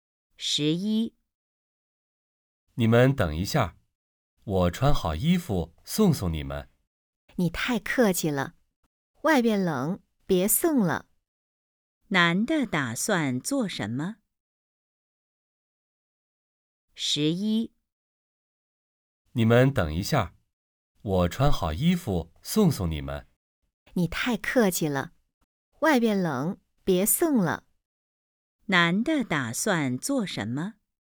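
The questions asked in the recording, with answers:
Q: 男的打算做什么?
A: 送他们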